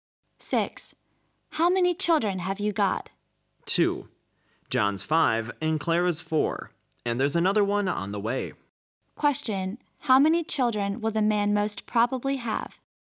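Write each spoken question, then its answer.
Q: How many children will the man most probably have?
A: Three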